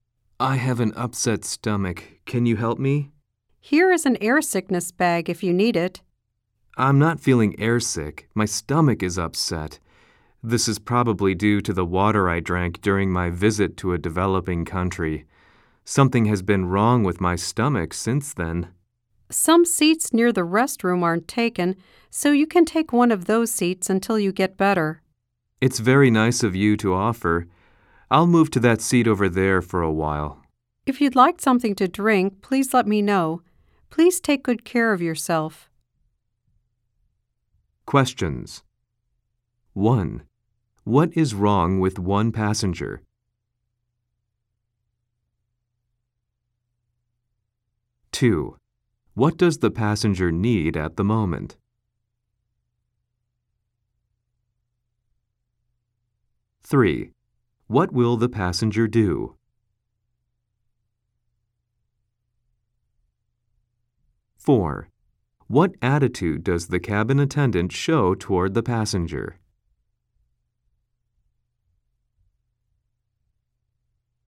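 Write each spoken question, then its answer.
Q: What is wrong with one passenger?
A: The passenger has an upset stomach.

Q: What will the passenger do?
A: Move to a seat near the restroom for a while.

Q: What attitude does the cabin attendant show toward the passenger?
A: Kind and helpful.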